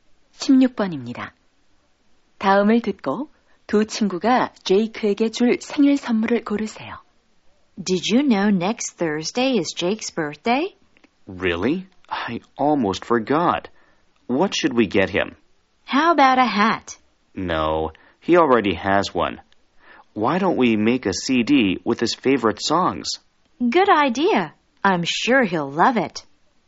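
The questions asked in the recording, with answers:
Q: 다음을 듣고 두 친구가 제이크에게 줄 생일 선물을 고르세요.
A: 좋아하는 노래를 담은 CD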